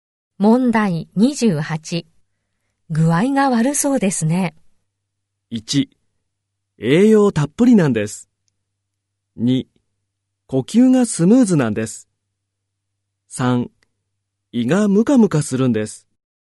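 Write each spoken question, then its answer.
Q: 具合が悪そうですね。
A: 3: 胃がムカムカするんです。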